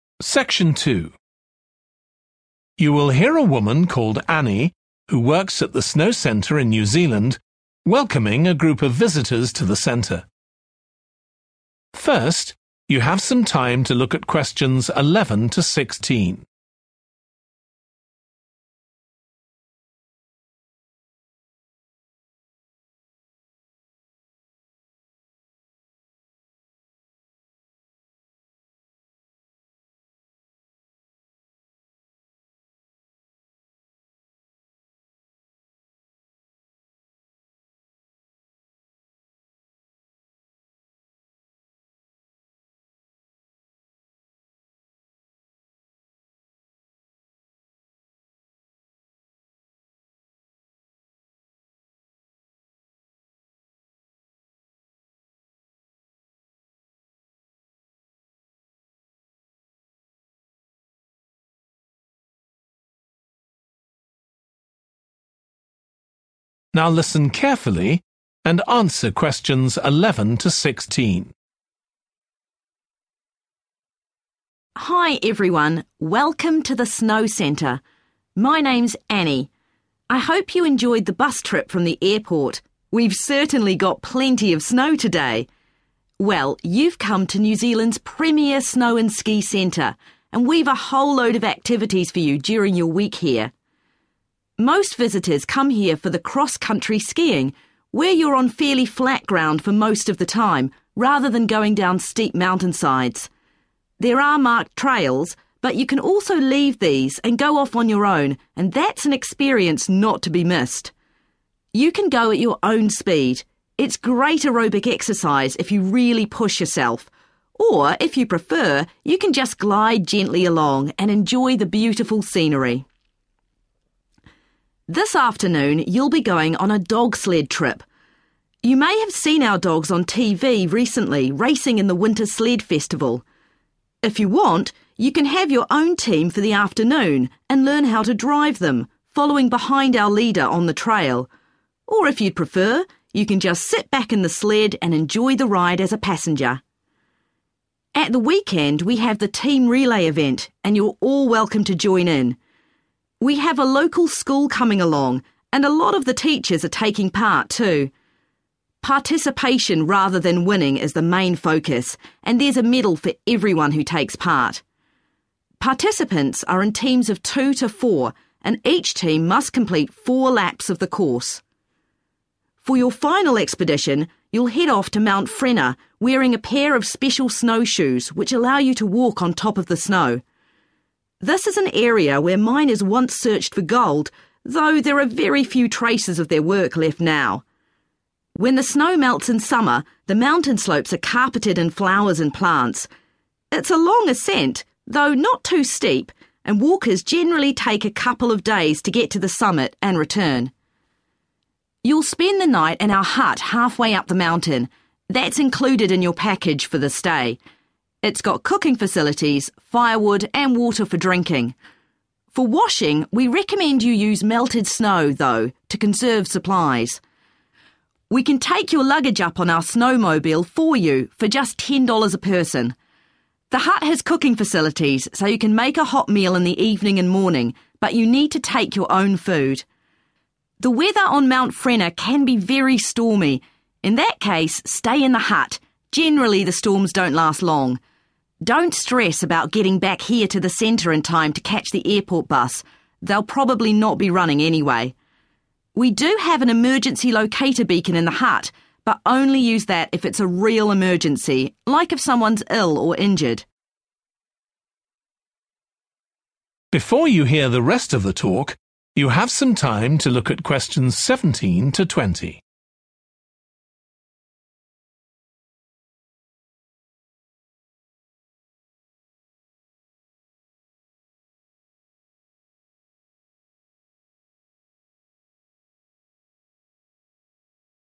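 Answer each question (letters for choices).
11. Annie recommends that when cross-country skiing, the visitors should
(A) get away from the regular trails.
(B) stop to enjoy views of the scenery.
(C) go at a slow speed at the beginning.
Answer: A

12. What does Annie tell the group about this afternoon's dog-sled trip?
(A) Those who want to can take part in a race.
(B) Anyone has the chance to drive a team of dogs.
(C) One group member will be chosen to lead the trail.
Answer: B

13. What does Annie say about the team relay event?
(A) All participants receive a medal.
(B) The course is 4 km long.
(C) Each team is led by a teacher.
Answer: A

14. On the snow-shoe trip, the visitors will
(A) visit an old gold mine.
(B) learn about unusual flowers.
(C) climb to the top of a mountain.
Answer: C

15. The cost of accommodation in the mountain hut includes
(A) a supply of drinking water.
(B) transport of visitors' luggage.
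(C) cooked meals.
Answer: A

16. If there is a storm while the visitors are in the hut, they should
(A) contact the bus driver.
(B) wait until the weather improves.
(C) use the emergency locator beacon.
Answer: B

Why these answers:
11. Most visitors come here for the cross-country skiing, where you're on fairly flat ground for most of the time, rather than going down steep mountainsides. There are marked trails, but you can also leave these and go off on your own and that's an experience not to be missed (Có những con đường mòn được đánh dấu, nhưng bạn cũng có thể bỏ qua những con đường này và tự mình đi và đó là một trải nghiệm không thể bỏ qua)
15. You'll spend the night in our hut half-way up the mountain. That's included in your package for the stay. It's got cooking facilities, firewood and water for drinking (Nó có khu vực nấu nướng, củi và nước uống)
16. The weather on Mount Frenner can be very stormy. 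In that case, stay in the hut – generally the storms don't last long (Trong trường hợp đó, hãy ở trong túp lều – thường cơn bão không kéo dài)

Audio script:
Most visitors come here for the cross-country skiing, where you're on fairly flat ground for most of the time, rather than going down steep mountainsides. There are marked trails, but you can also leave these and go off on your own and that's an experience not to be missed (Q11). You can go at your own speed – it's great aerobic exercise if you really push yourself, or if you prefer you can just glide gently along and enjoy the beautiful scenery.
A
This afternoon, you'll be going on a dog-sled trip. You may have seen our dogs on TV recently racing in the winter sled festival. If you want, you can have your own team for the afternoon and learn how to drive them (Q12), following behind our leader on the trail. Or if you'd prefer, you can just sit back in the sled and enjoy the ride as a passenger.
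At the weekend, we have the team relay event, and you're all welcome to join in. We have a local school coming along, and a lot of the teachers are taking part too. Participation rather than winning is the main focus, and there's a medal for everyone who takes part (Q13). Participants are in teams of two to four, and each team must complete four laps of the course.
For your final expedition, you'll head off to Mount Frenner wearing a pair of special snow shoes which allow you to walk on top of the snow. This is an area where miners once searched for gold, though there are very few traces of their work left now. When the snow melts in summer, the mountain slopes are carpeted in flowers and plants. It's a long ascent, though not too steep, and walkers generally take a couple of days to get to the summit (Q14) and return.
A
You'll spend the night in our hut half-way up the mountain. That's included in your package for the stay. 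It's got cooking facilities, firewood and water for drinking (Q15). For washing, we recommend you use melted snow, though, to conserve supplies. We can take your luggage up on our snowmobile for you for just ten dollars a person. The hut has cooking facilities so you can make a hot meal in the evening and morning, but you need to take your own food.
16
A
The weather on Mount Frenner can be very stormy. In that case, stay in the hut – generally the storms don't last long (Q16). Don't stress about getting back here to the centre in time to catch the airport bus – they'll probably not be running anyway. We do have an emergency locator beacon in the hut but only use that if it's real emergency, like if someone's ill or injured.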